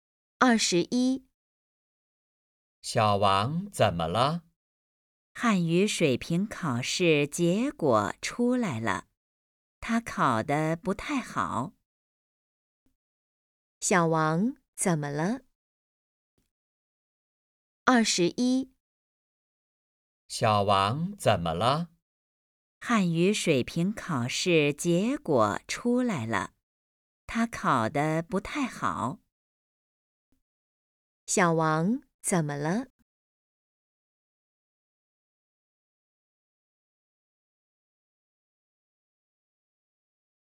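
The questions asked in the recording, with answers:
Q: 小王怎么了?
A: 汉语水平考试考得不太好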